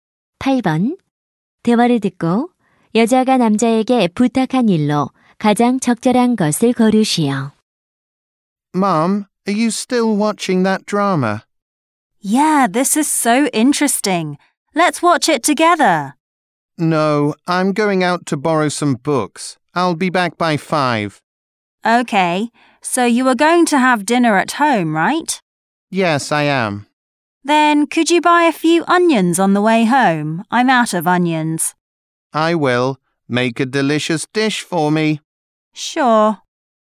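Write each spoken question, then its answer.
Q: 대화를 듣고 여자가 남자에게 부탁한 일로 가장 적절한 것을 고르시오.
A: 집에 오는 길에 양파 사 오기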